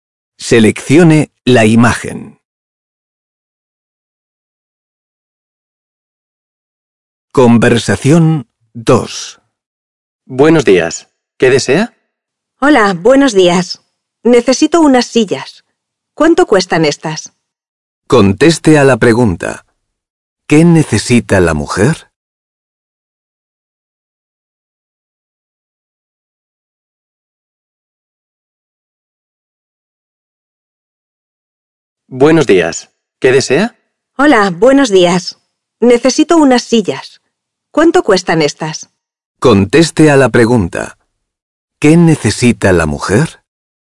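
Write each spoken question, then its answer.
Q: ¿Qué necesita la mujer?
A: Unas sillas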